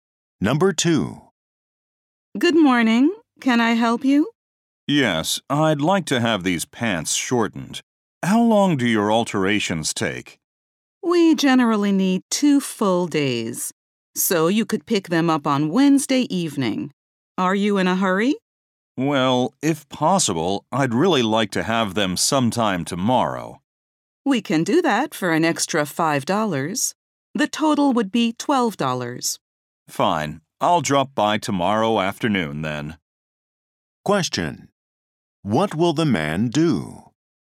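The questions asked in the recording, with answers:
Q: What will the man do?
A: Pay an extra $5 and pick up his pants tomorrow afternoon.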